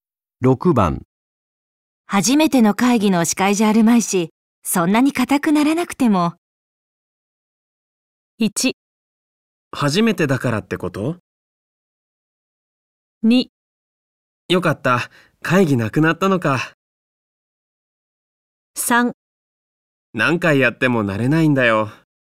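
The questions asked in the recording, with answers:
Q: 初めての会議の司会じゃあるまいし、そんなに固くならなくても。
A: 3: 何回やっても慣れないんだよ。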